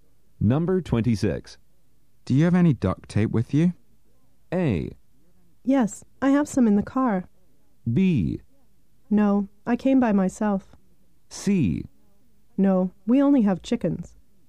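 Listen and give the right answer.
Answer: A: Yes, I have some in the car.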